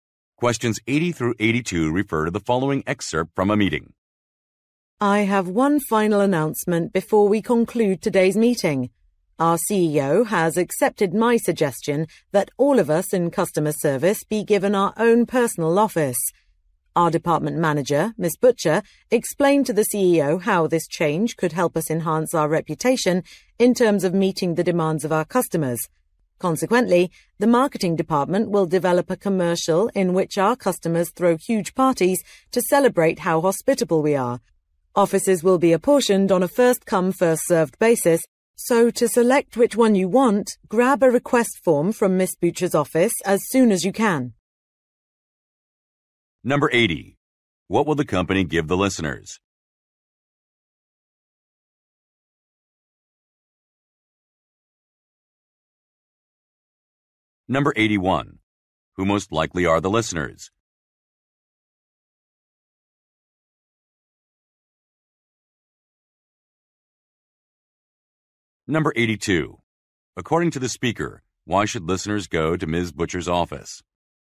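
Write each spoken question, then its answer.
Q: What will the company give the listeners?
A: Their own personal offices

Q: Who most likely are the listeners?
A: Customer service staff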